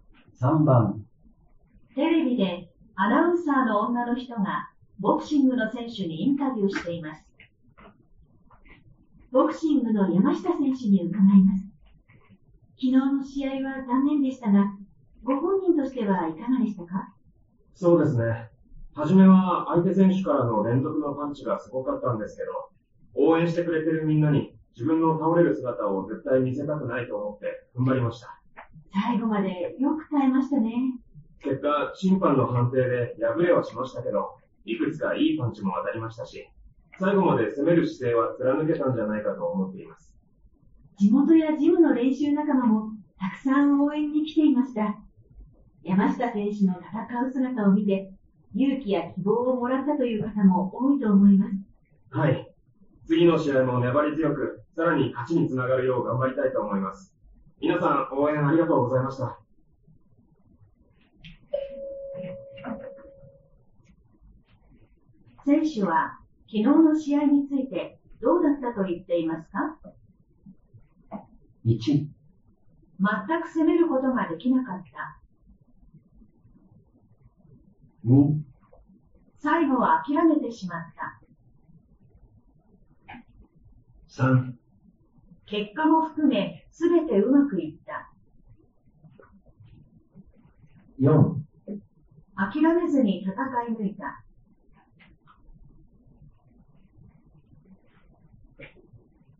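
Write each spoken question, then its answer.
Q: 選手は、昨日の試合についてどうだったと言っていますか?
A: 4: 諦めずに戦い抜いた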